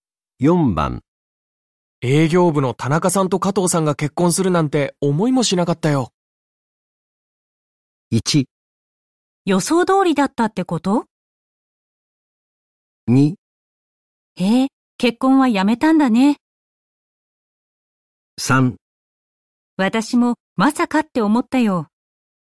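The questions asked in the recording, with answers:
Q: 営業部の田中さんと加藤さんが結婚するなんて思いもしなかったよ。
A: 3: 私もまさかって思ったよ。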